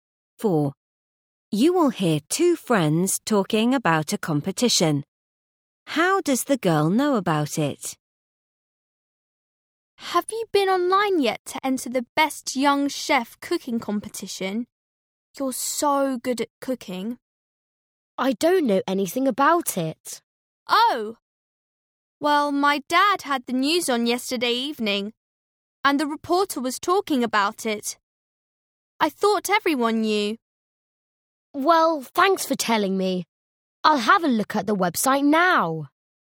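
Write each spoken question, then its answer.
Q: How does the girl know about it?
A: she heard about it on the news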